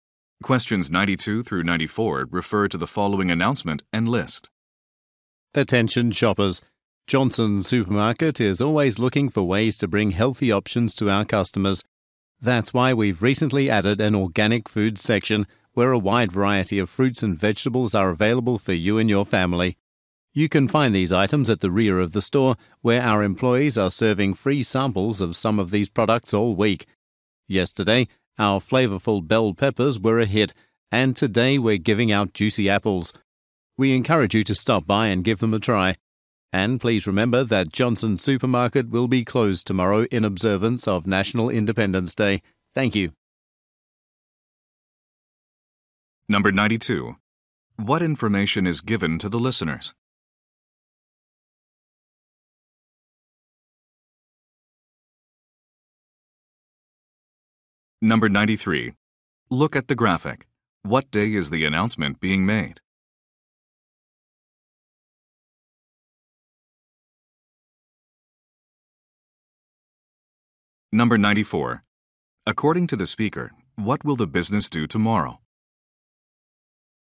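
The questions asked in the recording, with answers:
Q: According to the speaker, what will the business do tomorrow?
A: Close for National Independence Day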